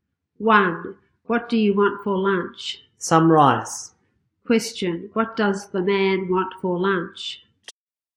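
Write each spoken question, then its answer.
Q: What does the man want for lunch?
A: Some rice.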